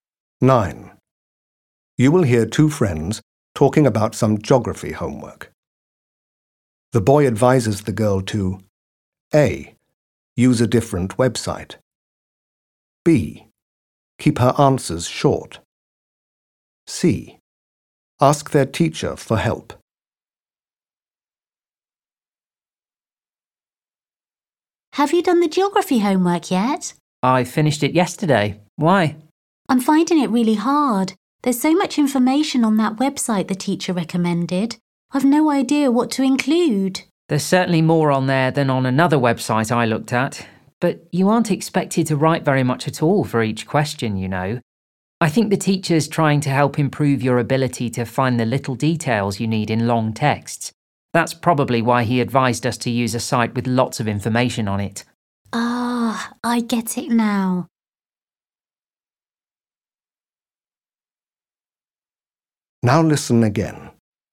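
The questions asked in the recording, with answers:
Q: The boy advises the girl to A.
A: B: Keep her answers short.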